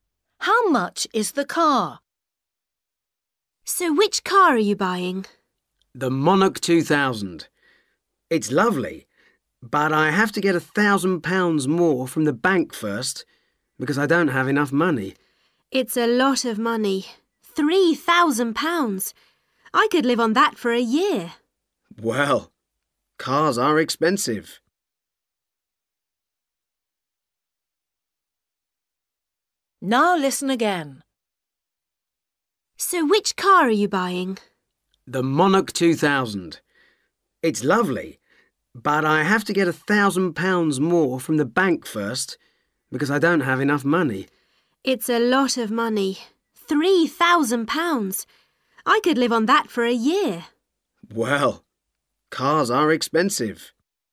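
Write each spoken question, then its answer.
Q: How much is the car?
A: £3,000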